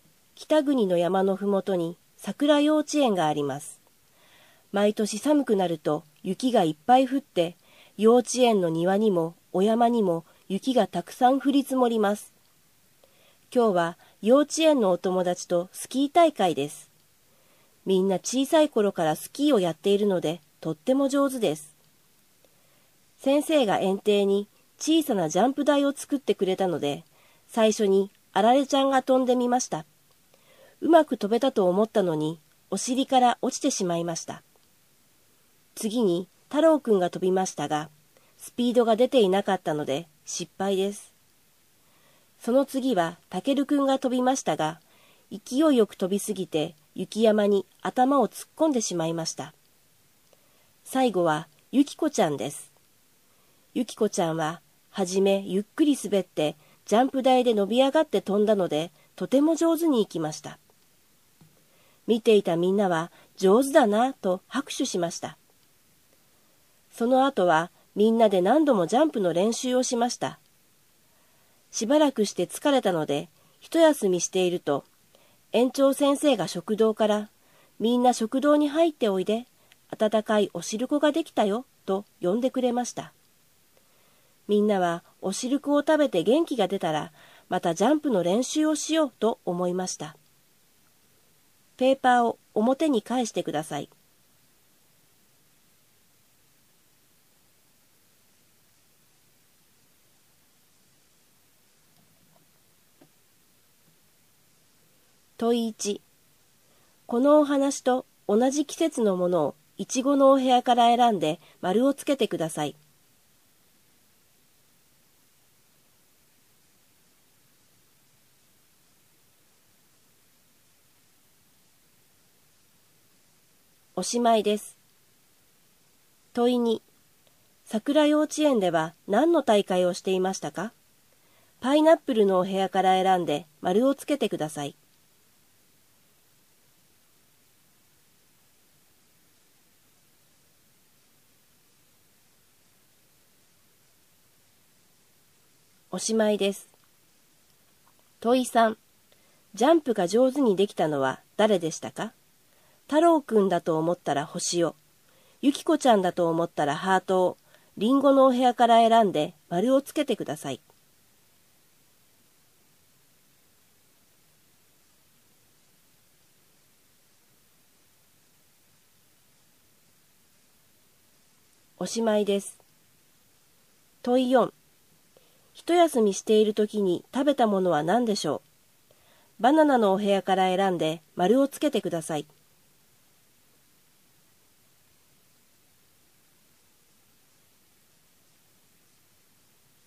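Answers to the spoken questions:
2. スキー大会
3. ゆきこちゃん(ハート)
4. お汁粉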